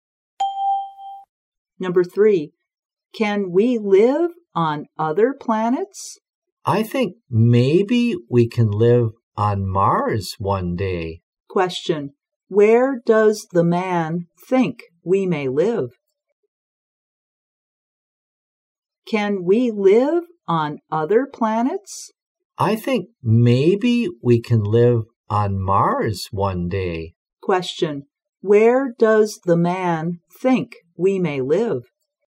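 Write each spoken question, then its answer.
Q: Where does the man think we may live?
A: On Mars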